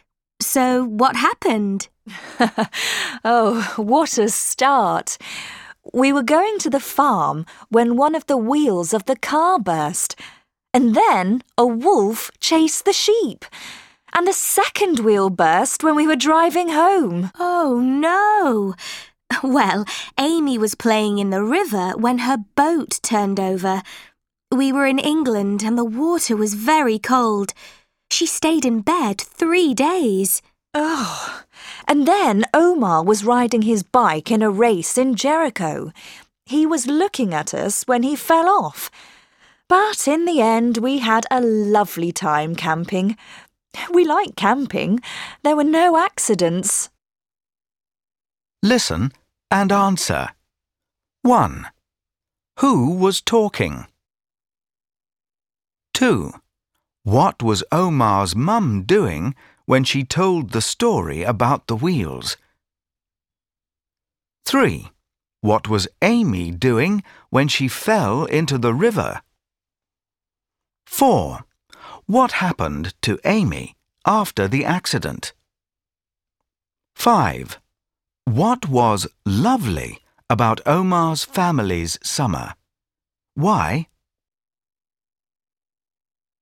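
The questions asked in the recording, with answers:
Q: What was Amy doing when she fell into the river?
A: She was playing in the river when her boat turned over.

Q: What happened to Amy after the accident?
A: She stayed in bed for 3 days.

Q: What was lovely about Omar's family's summer? Why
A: Camping, because there were no accidents.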